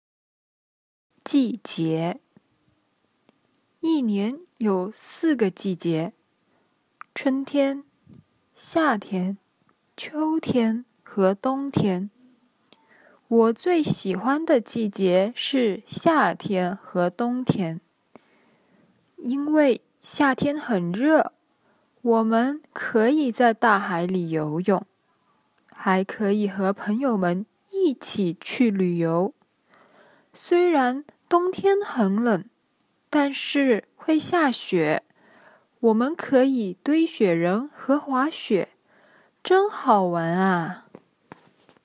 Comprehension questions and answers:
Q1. 我最喜欢哪两个季节?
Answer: 夏天和冬天

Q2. 冬天可以干什么?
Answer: 堆雪人和滑雪

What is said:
我最喜欢的季节是夏天和冬天。因为夏天很热,我们可以在大海里游泳,还可以和朋友们一起去旅游。
因为夏天很热,我们可以在大海里游泳,还可以和朋友们一起去旅游。 虽然冬天很冷,但是会下雪。我们可以堆雪人和滑雪,真好玩啊!

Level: intermediate